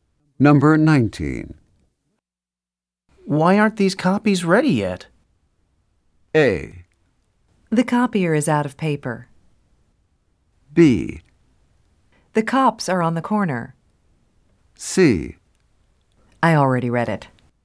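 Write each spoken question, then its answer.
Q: Why aren't these copies ready yet?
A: A: The copier is out of paper.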